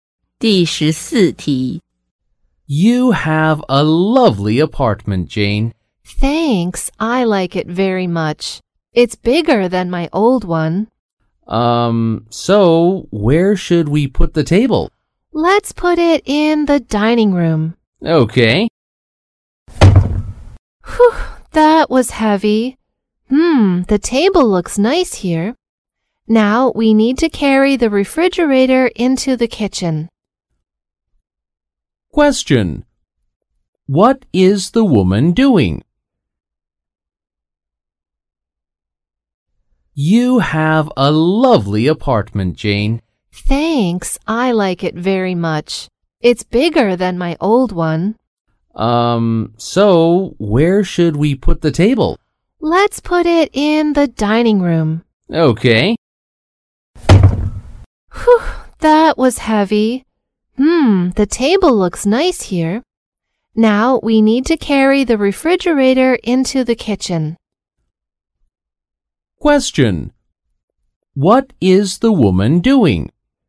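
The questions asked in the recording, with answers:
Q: What is the woman doing?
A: Moving into a new apartment (carrying furniture)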